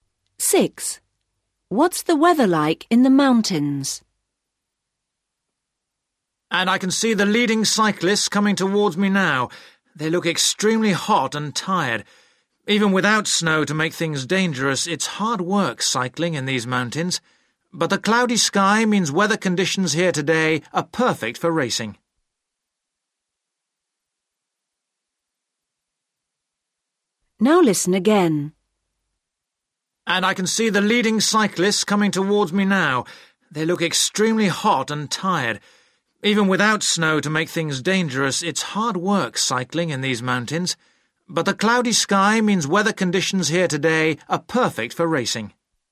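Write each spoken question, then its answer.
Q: What's the weather like in the mountains?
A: cloudy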